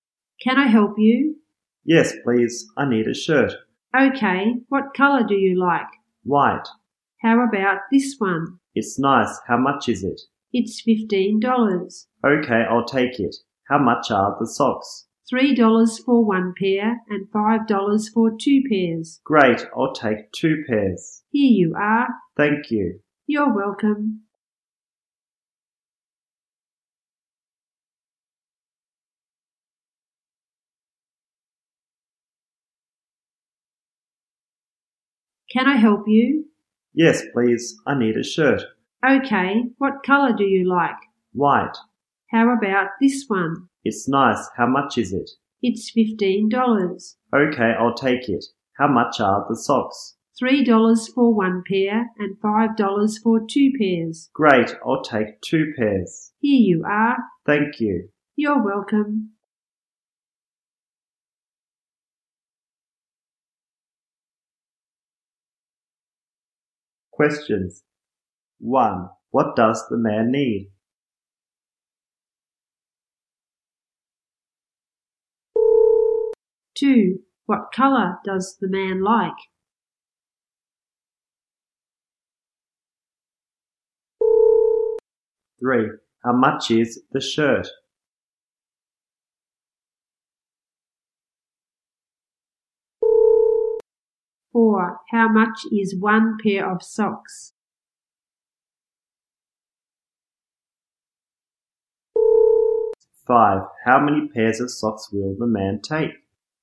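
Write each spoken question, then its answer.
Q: What does the man need?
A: A shirt

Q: What color does the man like?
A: White

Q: How much is the shirt?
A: $15

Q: How many pairs of socks will the man take?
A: Two pairs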